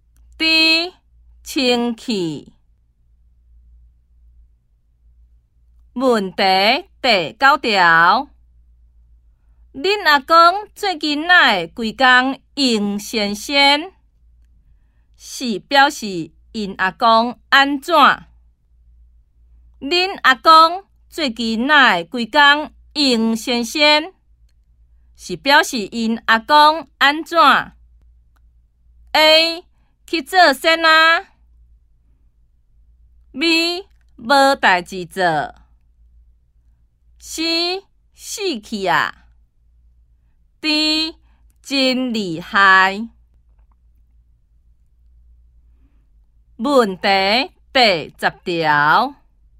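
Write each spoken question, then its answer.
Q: 是表示因阿公安怎?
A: B: 无代志做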